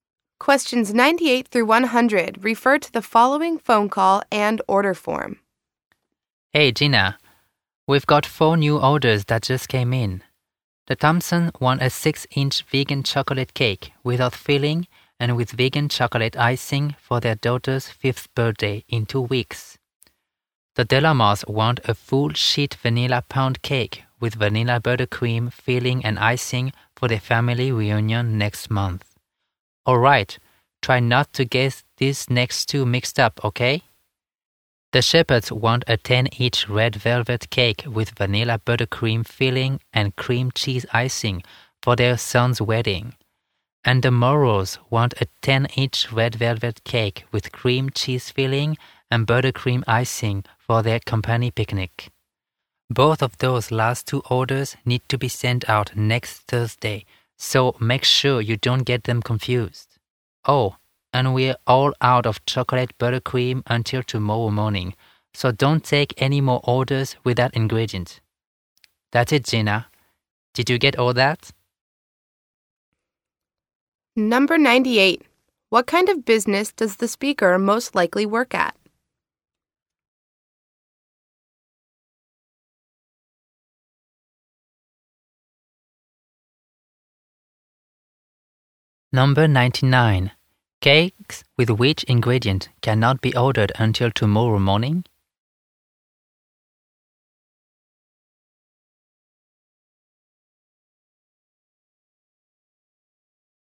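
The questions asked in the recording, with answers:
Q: What kind of business does the speaker most likely work at?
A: A bakery

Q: Cakes with which ingredient cannot be ordered until tomorrow morning?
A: Chocolate buttercream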